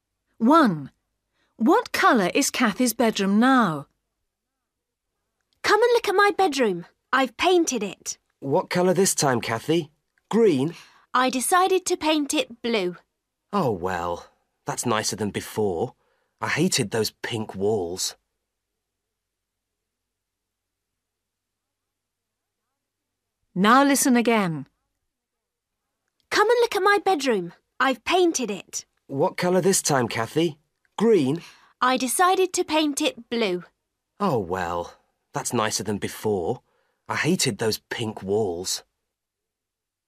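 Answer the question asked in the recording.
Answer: Blue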